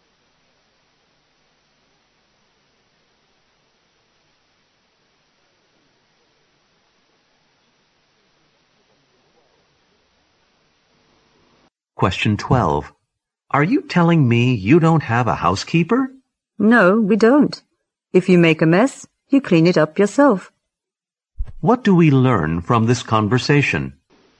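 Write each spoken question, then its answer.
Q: What do we learn from this conversation?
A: They have no housekeeper; everyone cleans up their own mess.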